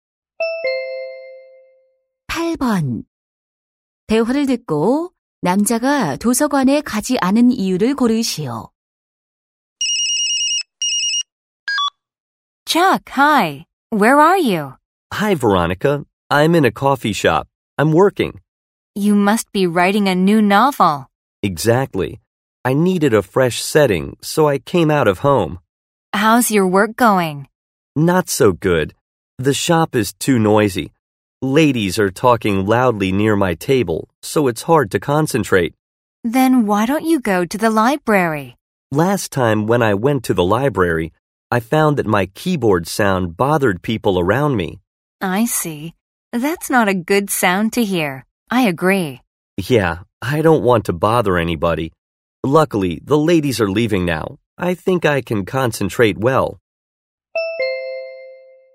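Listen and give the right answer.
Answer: 키보드 소리가 주변 사람들에게 방해가 되어서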